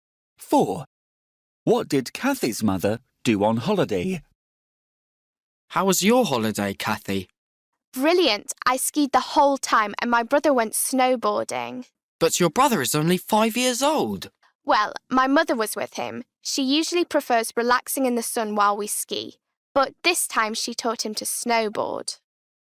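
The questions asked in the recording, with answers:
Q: What did Kathy's mother do on holiday?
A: she taught Kathy's brother to snowboard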